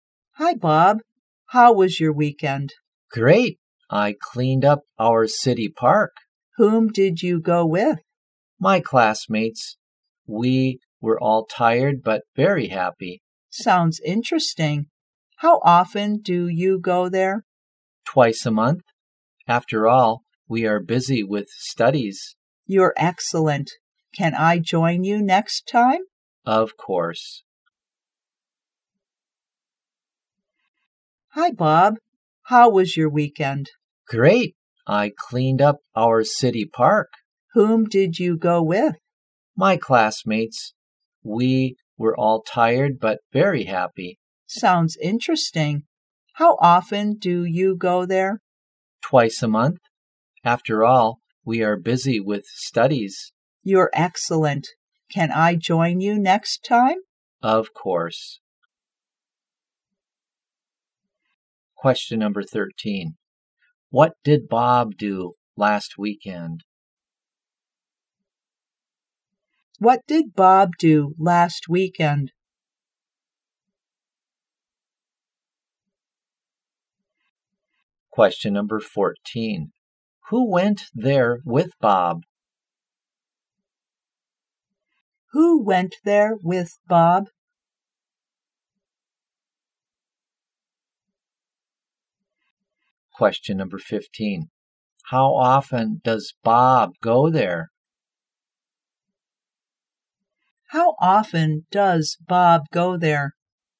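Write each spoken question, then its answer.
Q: What did Bob do last weekend?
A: He cleaned up the city park

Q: Who went there with Bob?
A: His classmates

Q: How often does Bob go there?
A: Twice a month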